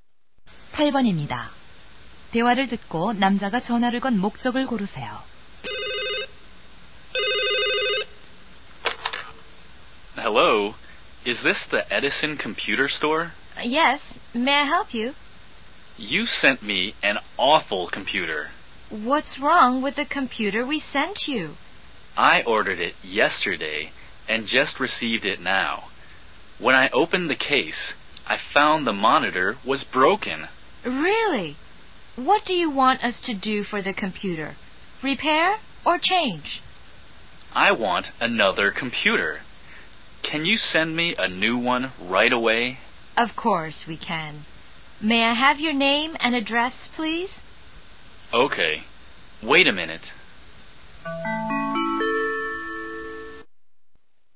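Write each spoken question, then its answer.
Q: 대화를 듣고 남자가 전화를 건 목적을 고르세요.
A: 고장 난 컴퓨터를 새 것으로 교환하려고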